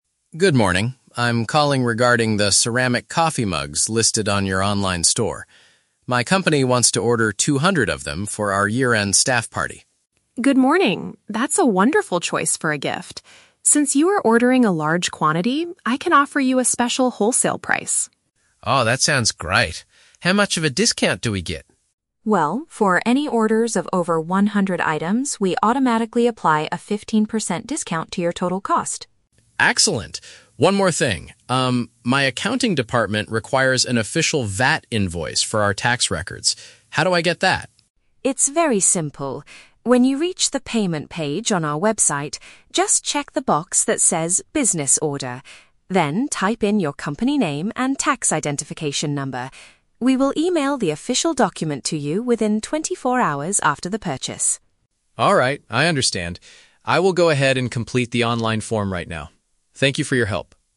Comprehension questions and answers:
Listen to a conversation between a purchasing officer and an online sales representative. Choose the best answer (A, B, or C) for each question.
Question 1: Why is the man contacting the online store?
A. To request a refund for some damaged ceramic mugs.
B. To buy a large number of employee gifts at a reduced price.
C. To apply for a job in their online wholesale department.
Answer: B. To buy a large number of employee gifts at a reduced price.

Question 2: What is the requirement to receive the fifteen percent discount?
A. The buyer must purchase more than a specific number of products.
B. The buyer must pay for the entire order using a corporate credit card.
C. The buyer must place the order during the special year-end sale.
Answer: A. The buyer must purchase more than a specific number of products.

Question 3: How will the man get the necessary tax document?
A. He has to visit the accounting department to pick it up in person.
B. The seller will send a paper copy to his physical office address.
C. He needs to enter his business details during the online checkout.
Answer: C. He needs to enter his business details during the online checkout.

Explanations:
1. David says his company wants to "order two hundred of them for our year-end staff party" and Lisa offers a "special wholesale price." Option B paraphrases this as buying a "large number of employee gifts at a reduced price."
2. Lisa states the discount is for "orders of over one hundred items." Option A paraphrases this mathematically as purchasing "more than a specific number of products."
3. Lisa instructs him to "check the box that says 'Business Order'" and "type in your company name and tax identification number" on the payment page. Option C paraphrases this as entering "business details during the online checkout."

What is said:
David: Good morning. I'm calling regarding the ceramic coffee mugs listed on your online store. My company wants to order two hundred of them for our year-end staff party.
Lisa: Good morning! That's a wonderful choice for a gift. Since you are ordering a large quantity, I can offer you a special wholesale price.
David: Oh, that sounds great. How much of a discount do we get?
Lisa: Well, for any orders of over one hundred items, we automatically apply a fifteen percent discount to your total cost.
David: Excellent. One more thing, um, my accounting department requires an official VAT invoice for our tax records. How do I get that?
Lisa: It's very simple. When you reach the payment page on our website, just check the box that says "Business Order". Then, type in your company name and tax identification number. We will email the official document to you within twenty-four hours after the purchase.
David: Alright, I understand. I will go ahead and complete the online form right now. Thank you for your help.

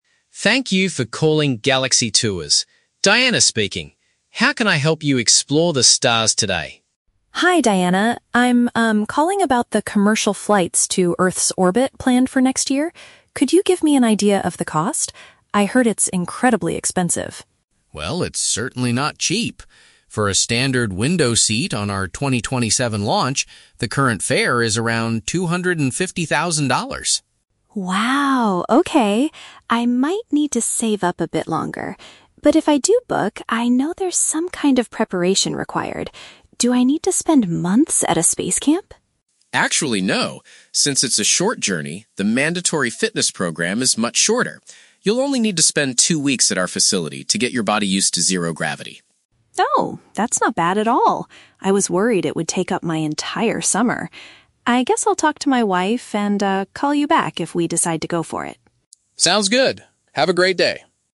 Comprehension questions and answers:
Listen to a phone conversation between a customer and a travel agent, then choose the correct answer (A, B, or C) for each question.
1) How much does a passenger need to pay for a regular spot on the spacecraft?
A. Approximately a quarter of a million dollars.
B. It is surprisingly inexpensive for early bookings.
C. They must pay an extra fee to get a seat next to the window.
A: A. Approximately a quarter of a million dollars.

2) What is the requirement regarding the physical preparation?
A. Travelers must train for several months at a special camp.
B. Passengers are required to exercise at the center for fourteen days.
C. Customers can completely skip the fitness program if it's a short trip.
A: B. Passengers are required to exercise at the center for fourteen days.

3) What will the caller most likely do next?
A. He will immediately reserve two tickets for his family.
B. He will spend his summer vacation at the space facility.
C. He will discuss the travel possibility with his spouse.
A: C. He will discuss the travel possibility with his spouse.

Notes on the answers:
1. The agent states the fare is "two hundred and fifty thousand dollars" ($250,000). This amount is exactly a quarter of a million dollars. Why the trap is wrong: Option (B) is a trap. The agent clearly states the ticket is "certainly not cheap." Option (C) is a trap because the $250,000 is for a "standard window seat," meaning the window seat is the regular price, not an extra fee.
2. The agent explains that travelers need to "spend two weeks at our facility." "Fourteen days" is a direct paraphrase of two weeks. Why the trap is wrong: Option (A) is a trap. The customer asks if he needs to "spend months at a space camp," but the agent replies "Actually, no." Option (C) is also a trap. The agent mentions it is a short journey, but the fitness program is still "mandatory" (required), so they cannot skip it.

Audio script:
Agent: Thank you for calling Galaxy Tours. Diana speaking. How can I help you explore the stars today?
Customer: Hi, Diana. I'm, um, calling about the commercial flights to Earth's orbit planned for next year. Could you give me an idea of the cost? I heard it's incredibly expensive.
Agent: Well, it's certainly not cheap! For a standard window seat on our 2027 launch, the current fare is around two hundred and fifty thousand dollars.
Customer: Wow, okay. I might need to save up a bit longer. But if I do book, I know there's some kind of preparation required. Do I need to spend months at a space camp?
Agent: Actually, no. Since it's a short journey, the mandatory fitness program is much shorter. You'll only need to spend two weeks at our facility to get your body used to zero gravity.
Customer: Oh, that's not bad at all. I was worried it would take up my entire summer. I guess I'll talk to my wife and, ah, call you back if we decide to go for it.

